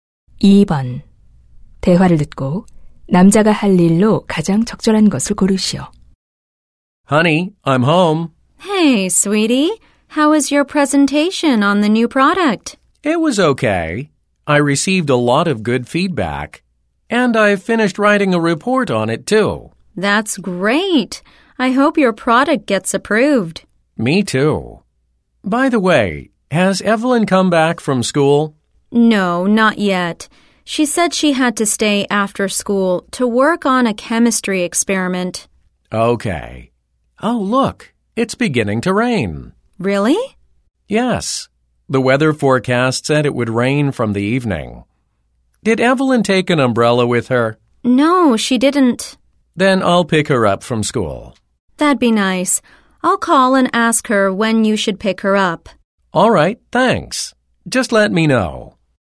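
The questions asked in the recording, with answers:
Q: 대화를 듣고 남자가 할 일로 가장 적절한 것을 고르시오.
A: 학교에 딸 데리러 가기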